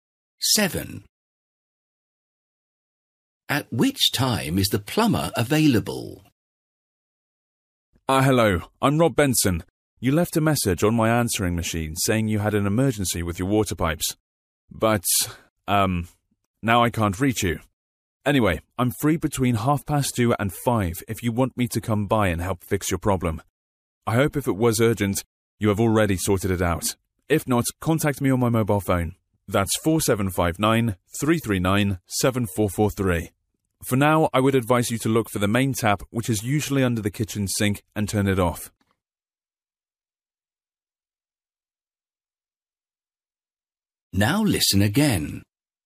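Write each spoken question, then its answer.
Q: At which time is the plumber available?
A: Between 2:30 and 5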